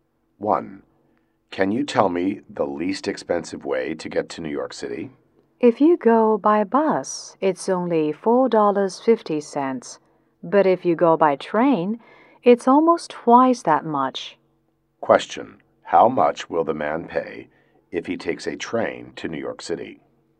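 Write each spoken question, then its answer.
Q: How much will the man pay if he takes a train to New York City?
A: About $9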